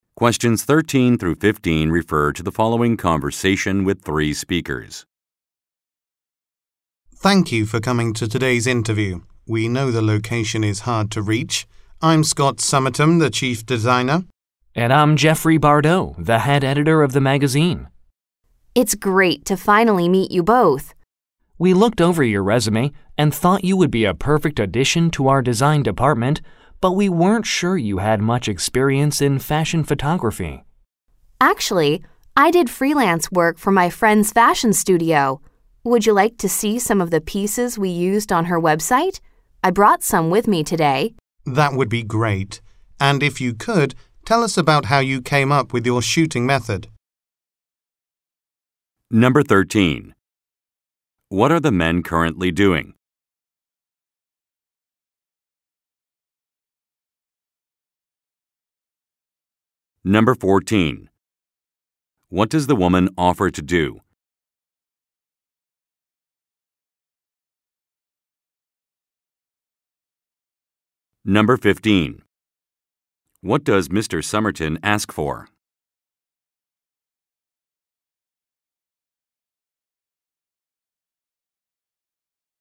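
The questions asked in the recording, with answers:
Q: What are the men currently doing?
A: Conducting a job interview

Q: What does the woman offer to do?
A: Show some of the photos she took for her friend's fashion studio website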